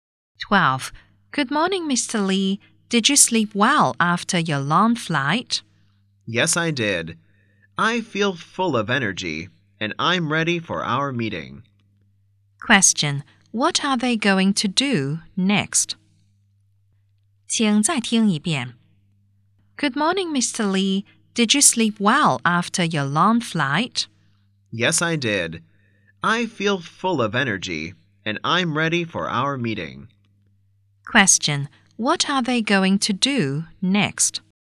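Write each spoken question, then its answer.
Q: What are they going to do next?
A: Have a meeting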